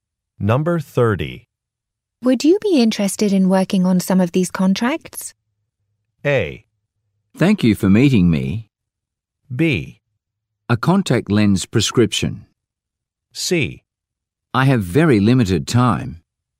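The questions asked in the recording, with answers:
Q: Would you be interested in working on some of these contracts?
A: C: I have very limited time.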